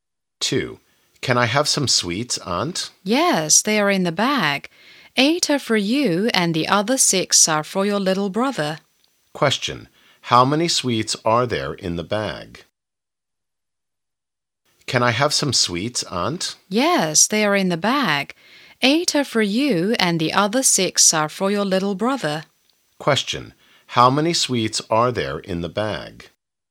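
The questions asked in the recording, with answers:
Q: How many sweets are there in the bag?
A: 14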